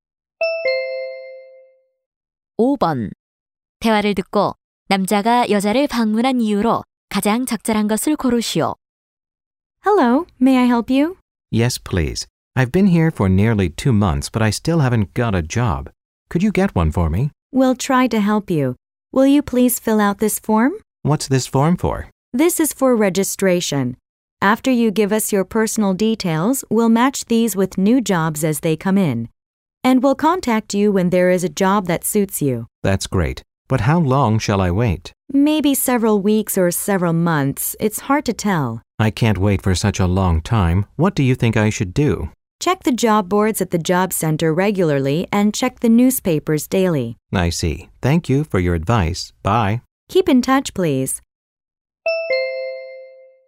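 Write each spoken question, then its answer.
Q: 대화를 듣고 남자가 여자를 방문한 이유로 가장 적절한 것을 고르시오.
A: 일자리를 구하려고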